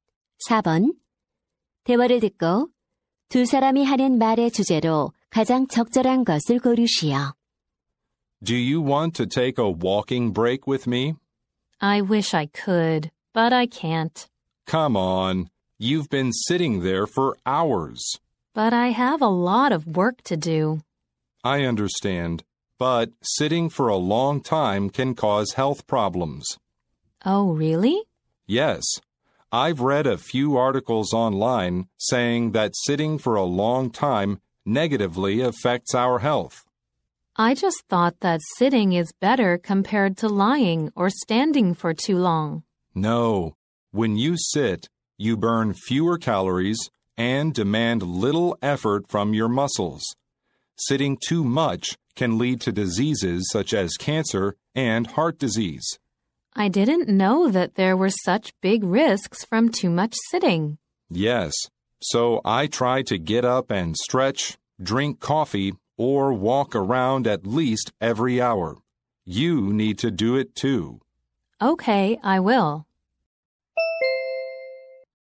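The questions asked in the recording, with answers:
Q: 대화를 듣고 두 사람이 하는 말의 주제로 가장 적절한 것을 고르시오.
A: 오래 앉아 있는 것이 건강에 미치는 악영향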